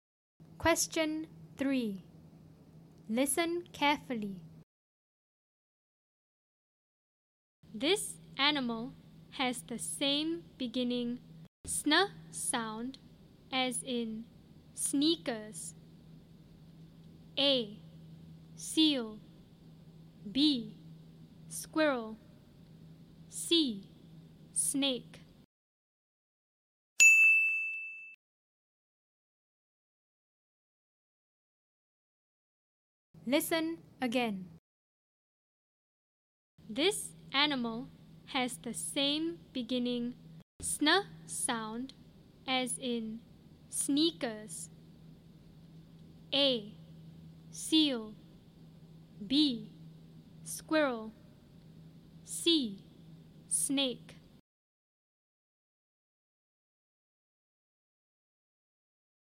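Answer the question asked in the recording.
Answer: C: Snake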